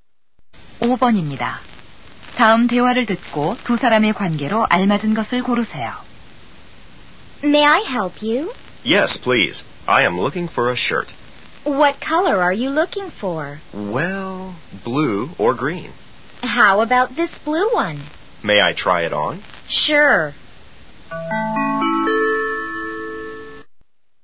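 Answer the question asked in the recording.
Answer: 점원과 손님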